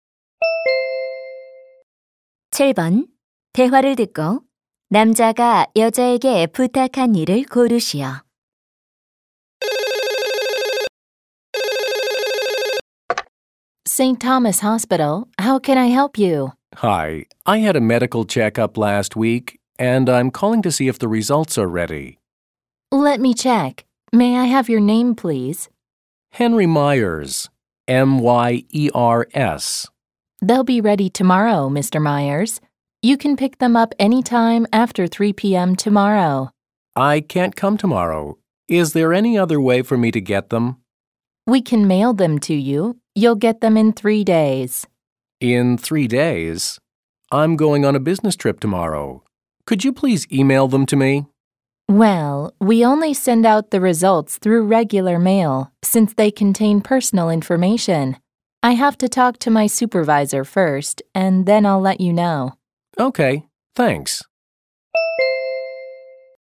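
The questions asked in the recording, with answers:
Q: 대화를 듣고 남자가 여자에게 부탁한 일을 고르시오.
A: 검진 결과를 이메일로 보내 주기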